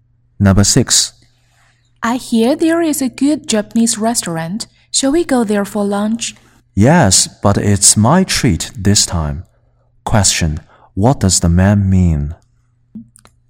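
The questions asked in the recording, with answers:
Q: What does the man mean?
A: He will pay for lunch this time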